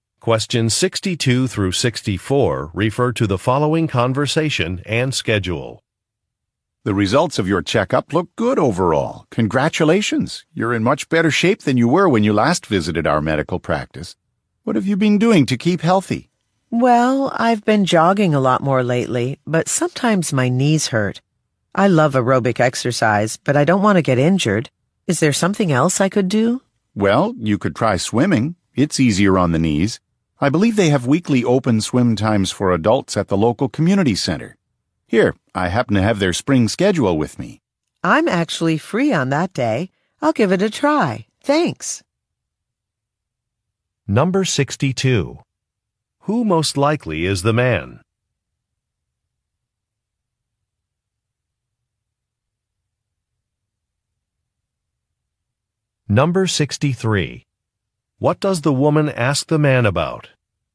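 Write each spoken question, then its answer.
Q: Who most likely is the man?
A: A doctor

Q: What does the woman ask the man about?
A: Another type of exercise that is easier on her knees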